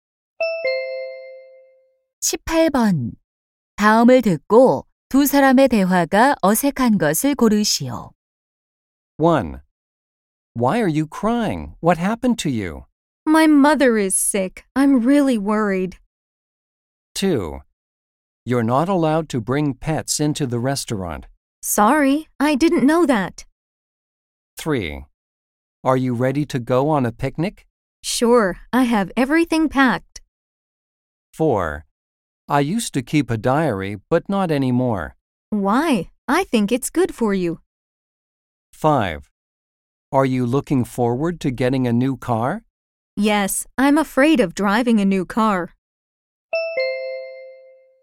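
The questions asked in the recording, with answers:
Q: 다음을 듣고 두 사람의 대화가 어색한 것을 고르시오.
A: 5: Are you looking forward to getting a new car? / Yes, I'm afraid of driving a new car.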